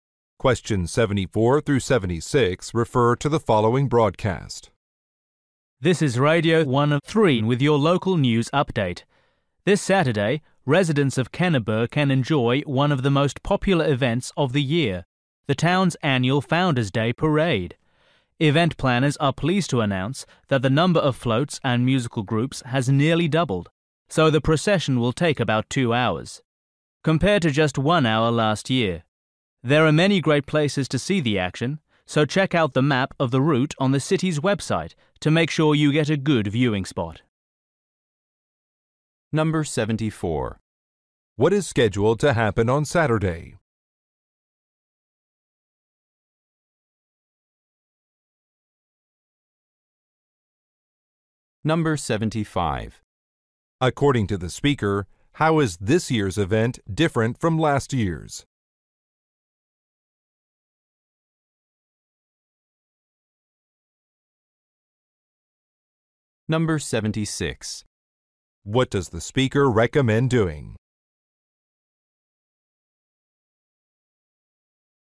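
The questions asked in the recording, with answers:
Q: What is scheduled to happen on Saturday?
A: The annual Founders Day Parade

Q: According to the speaker, how is this year's event different from last year's?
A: It will last longer (about 2 hours)

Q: What does the speaker recommend doing?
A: Checking the route map on the city's website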